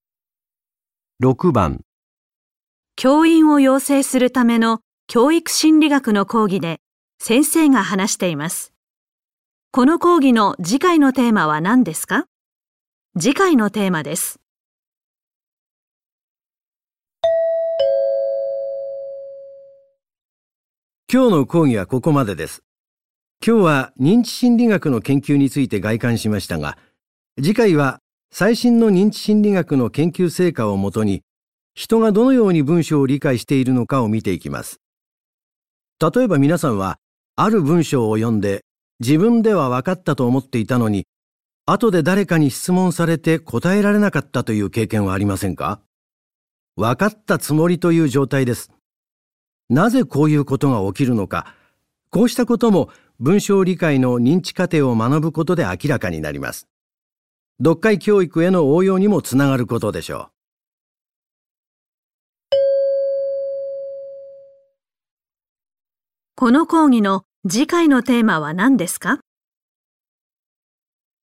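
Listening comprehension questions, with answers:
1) この講義の次回のテーマはなんですか。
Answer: 人がどのように文章を理解しているか(文章理解の認知過程)

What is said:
男:今日の講義はここまでです。今日は認知心理学の研究について概観しましたが、次回は、最新の認知心理学の研究成果をもとに、人がどのように文章を理解しているのかを見ていきます。例えば皆さんは、ある文章を読んで、自分ではわかったと思っていたのに、後で誰かに質問 されて答えられなかったという経験はありませんか?「わかったつもり」という状態です。なぜこういうことが起きるのか、こうしたことも文 章を理解の認知過程を学ぶことで明らかになります。読解教育への応用にもつながることでしょう。

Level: N1级别听力题库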